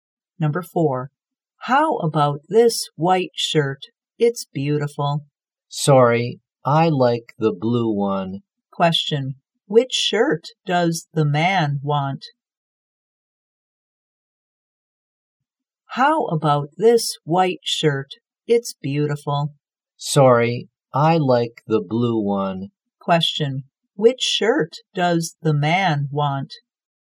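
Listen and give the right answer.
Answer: The blue one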